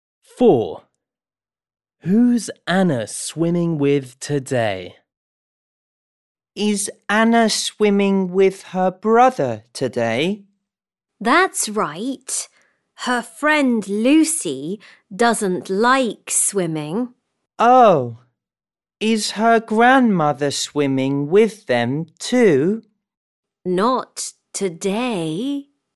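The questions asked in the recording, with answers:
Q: Who's Anna swimming with today?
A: her brother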